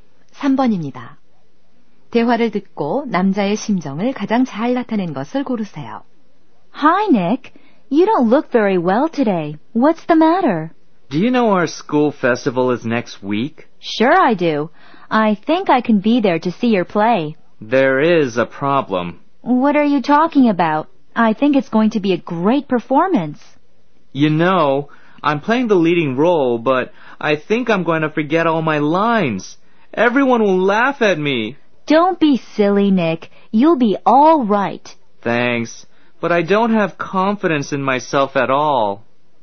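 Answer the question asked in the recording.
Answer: 불안함, 걱정스러움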